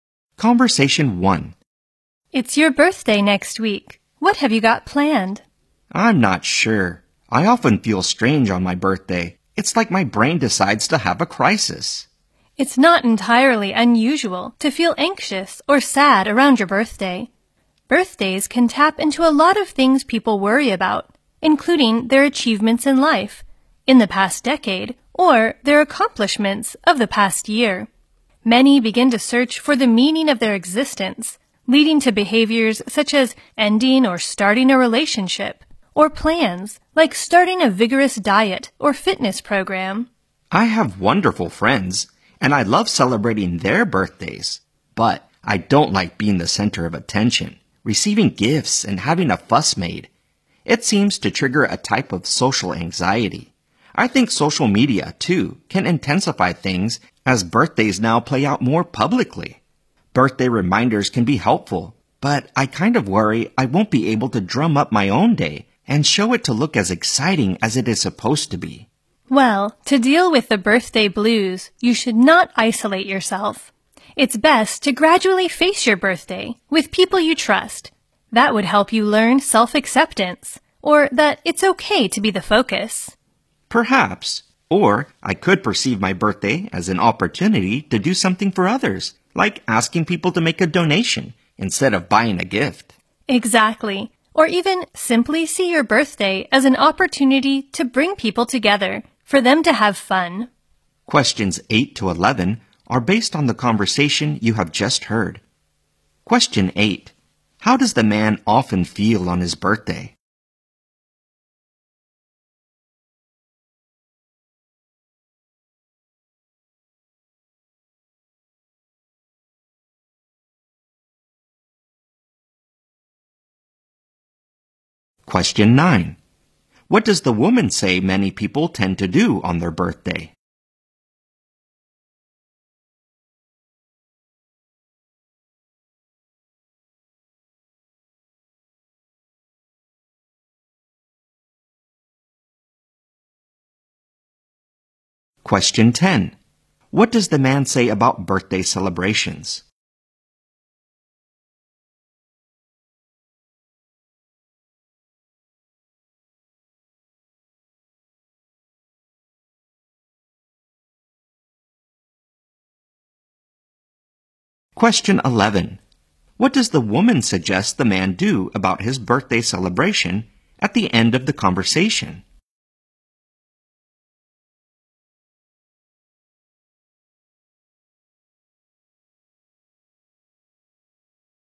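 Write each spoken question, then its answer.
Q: How does the man often feel on his birthday?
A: Strange, as if his brain has a crisis

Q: What does the woman say many people tend to do on their birthday?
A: Search for the meaning of their existence

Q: What does the man say about birthday celebrations?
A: He doesn't like being the center of attention; it triggers social anxiety

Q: What does the woman suggest the man do about his birthday celebration at the end of the conversation?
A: See it as an opportunity to bring people together to have fun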